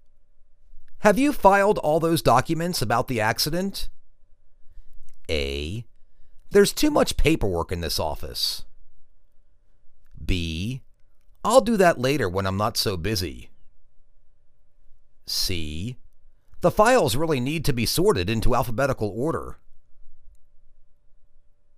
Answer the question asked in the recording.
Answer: I'll do that later when I'm not so busy.